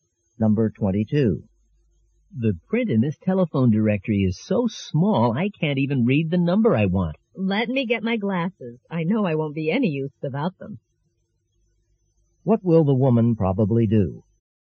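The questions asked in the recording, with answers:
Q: What will the woman probably do?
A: Get her glasses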